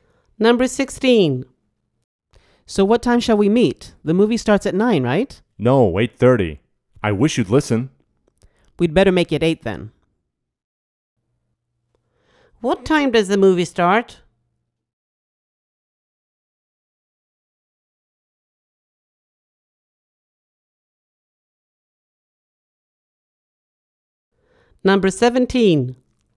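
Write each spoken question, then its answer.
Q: What time does the movie start?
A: 8:30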